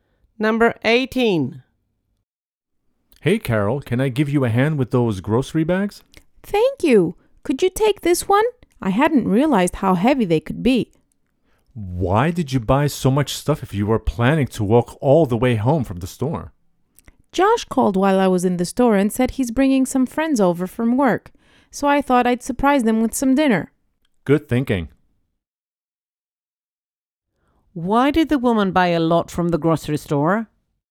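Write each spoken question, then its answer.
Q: Why did the woman buy a lot from the grocery store?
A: Josh is bringing friends over from work and she wants to surprise them with dinner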